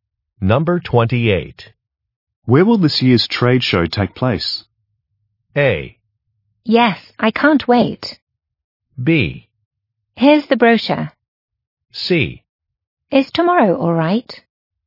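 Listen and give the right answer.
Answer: B: Here's the brochure.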